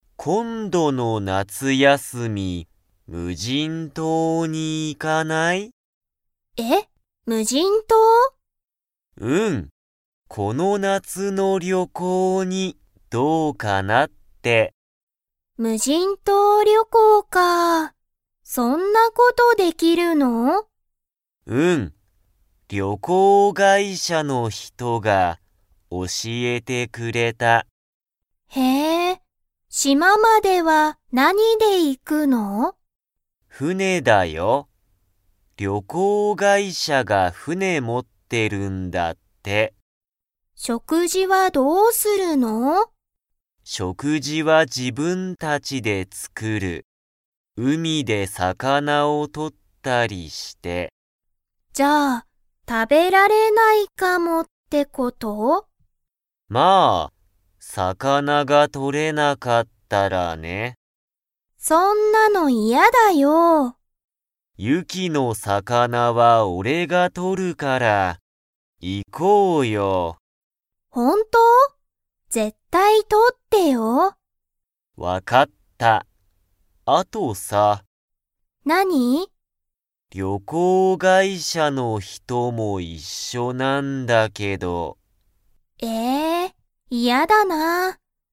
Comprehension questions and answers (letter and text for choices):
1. 島しままでは、何なにで行いきますか?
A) バス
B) 電車でんしゃ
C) 船ふね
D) 飛行機ひこうき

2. ユキは、リョウタと二人ふたりで旅行りょこうに 。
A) 行いきたい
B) 行いきたくない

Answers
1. C) 船ふね
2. A) 行いきたい

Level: Level 3